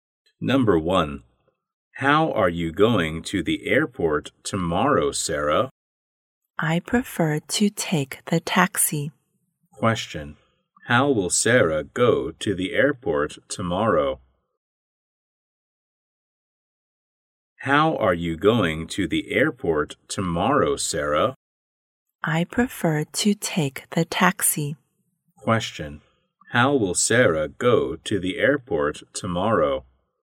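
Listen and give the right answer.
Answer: By taxi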